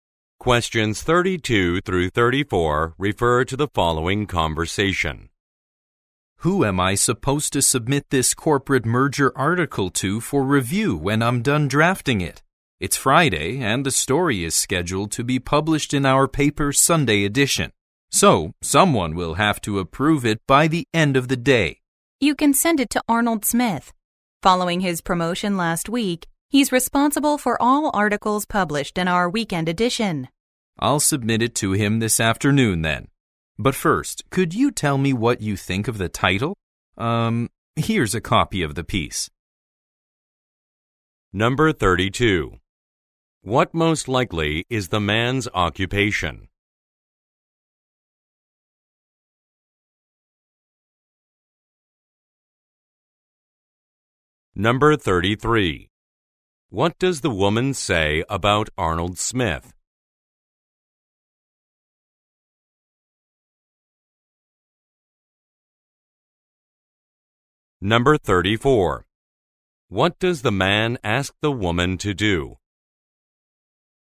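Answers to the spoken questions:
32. A journalist
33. He was recently promoted and is responsible for weekend edition articles
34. Give her opinion of the article's title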